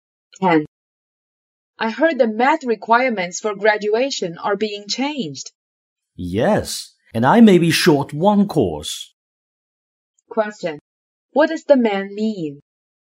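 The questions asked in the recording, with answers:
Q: What does the man mean?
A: He may need one more course to graduate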